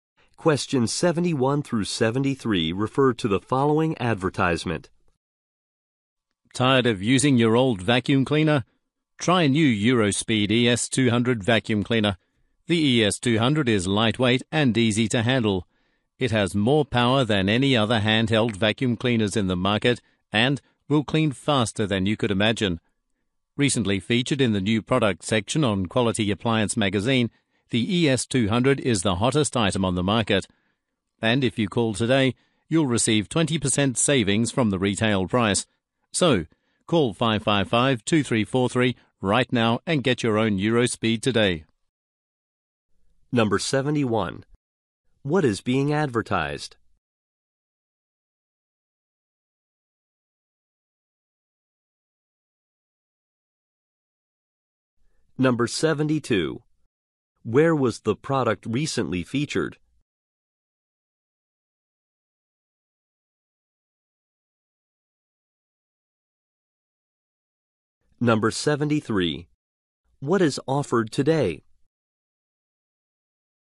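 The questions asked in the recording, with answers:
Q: What is being advertised?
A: A vacuum cleaner (Eurospeed ES200)

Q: Where was the product recently featured?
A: In Quality Appliance magazine

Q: What is offered today?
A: 20% savings off the retail price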